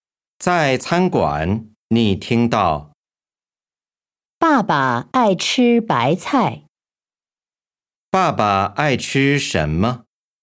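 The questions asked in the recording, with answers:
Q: 爸爸爱吃什么?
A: 白菜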